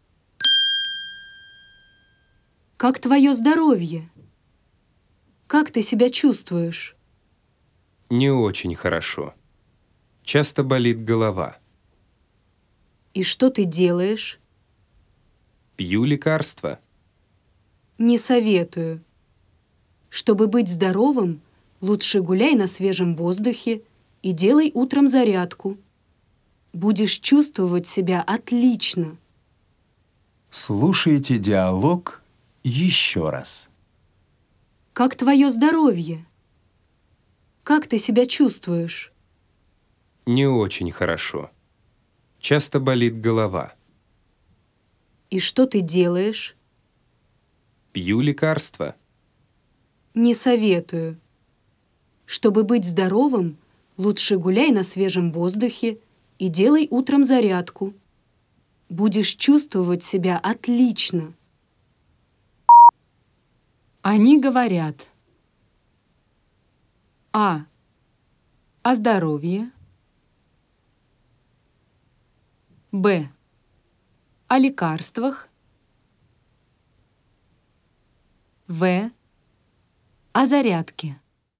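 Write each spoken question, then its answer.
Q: Они говорят.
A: А: О здоровье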